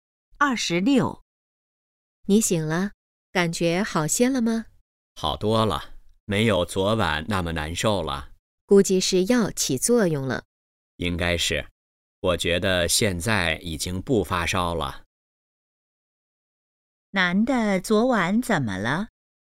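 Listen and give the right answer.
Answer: 发烧了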